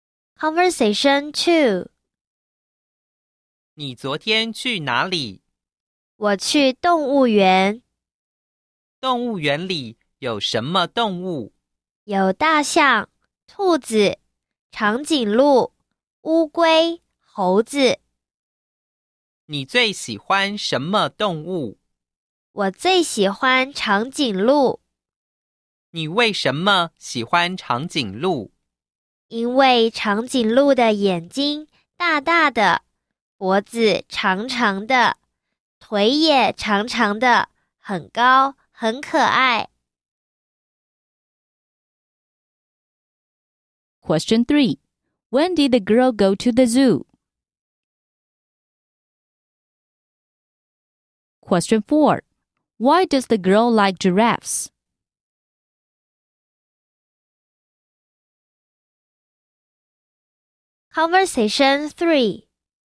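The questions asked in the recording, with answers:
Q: When did the girl go to the zoo?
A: Yesterday

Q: Why does the girl like giraffes?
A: Big eyes, long neck and long legs, tall and cute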